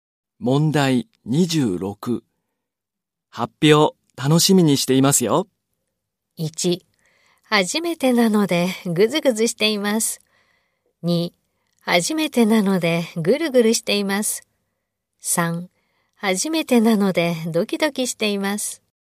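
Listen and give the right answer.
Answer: 3: 初めてなのでドキドキしています。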